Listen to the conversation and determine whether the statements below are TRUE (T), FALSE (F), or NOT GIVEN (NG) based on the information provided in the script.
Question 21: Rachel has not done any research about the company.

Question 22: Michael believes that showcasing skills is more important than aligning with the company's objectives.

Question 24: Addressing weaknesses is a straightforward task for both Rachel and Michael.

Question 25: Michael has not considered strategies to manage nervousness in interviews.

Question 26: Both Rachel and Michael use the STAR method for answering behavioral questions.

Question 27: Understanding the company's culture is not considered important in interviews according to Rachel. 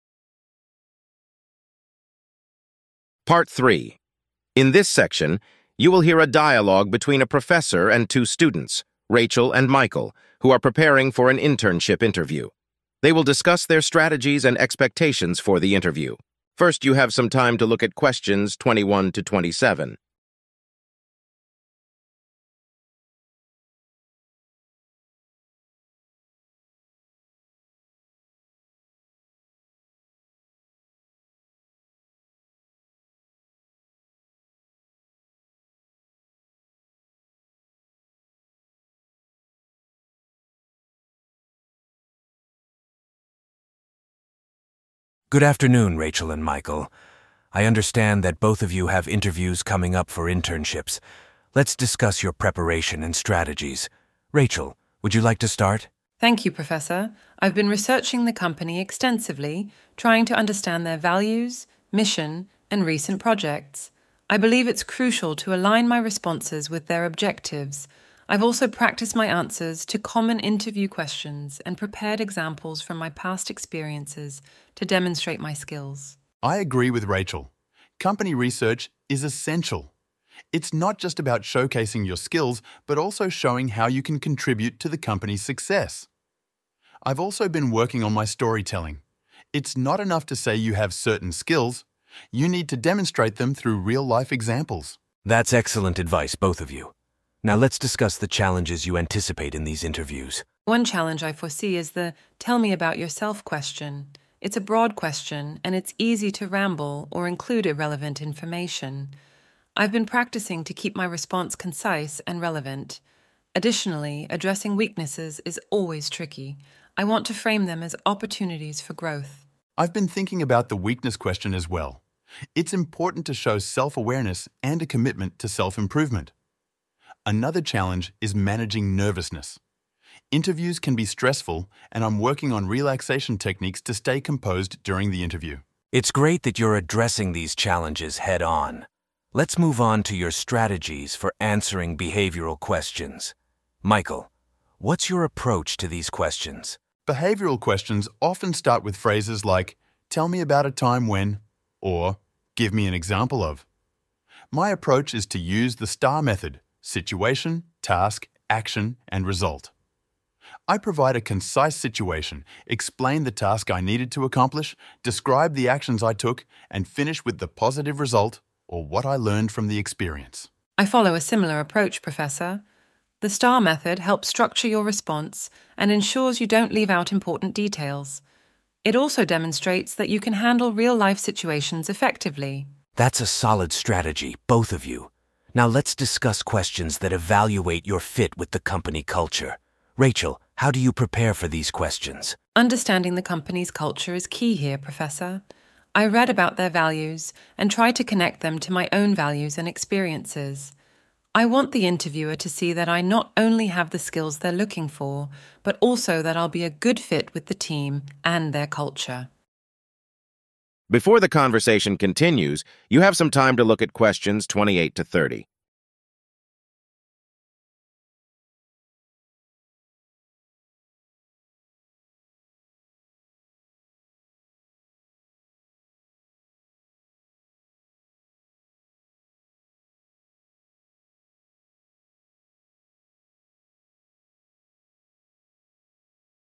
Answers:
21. FALSE
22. FALSE
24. FALSE
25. FALSE
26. TRUE
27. FALSE

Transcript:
Professor: Good afternoon, Rachel and Michael. I understand that both of you have interviews coming up for internships. Let's discuss your preparation and strategies. Rachel, would you like to start?
Rachel: Thank you, Professor. I've been researching the company extensively, trying to understand their values, mission, and recent projects. I believe it's crucial to align my responses with their objectives. I've also practiced my answers to common interview questions and prepared examples from my past experiences to demonstrate my skills.
Michael: I agree with Rachel. Company research is essential. It's not just about showcasing your skills but also showing how you can contribute to the company's success. I've also been working on my storytelling. It's not enough to say you have certain skills; you need to demonstrate them through real-life examples.
Professor: That's excellent advice, both of you. Now, let's discuss the challenges you anticipate in these interviews.
Rachel: One challenge I foresee is the "tell me about yourself" question. It's a broad question, and it's easy to ramble or include irrelevant information. I've been practicing to keep my response concise and relevant. Additionally, addressing weaknesses is always tricky. I want to frame them as opportunities for growth.
Michael: I've been thinking about the weakness question as well. It's important to show self-awareness and a commitment to self-improvement. Another challenge is managing nervousness. Interviews can be stressful, and I'm working on relaxation techniques to stay composed during the interview.
Professor: It's great that you're addressing these challenges head-on. Let's move on to your strategies for answering behavioral questions. Michael, what's your approach to these questions?
Michael: Behavioral questions often start with phrases like "Tell me about a time when..." or "Give me an example of..." My approach is to use the STAR method: Situation, Task, Action, and Result. I provide a concise situation, explain the task I needed to accomplish, describe the actions I took, and finish with the positive result or what I learned from the experience.
Rachel: I follow a similar approach, Professor. The STAR method helps structure your response and ensures you don't leave out important details. It also demonstrates that you can handle real-life situations effectively.
Professor: That's a solid strategy, both of you. Now, let's discuss questions that evaluate your fit with the company culture. Rachel, how do you prepare for these questions?
Rachel: Understanding the company's culture is key here, Professor. I read about their values and try to connect them to my own values and experiences. I want the interviewer to see that I not only have the skills they're looking for but also that I'll be a good fit with the team and their culture.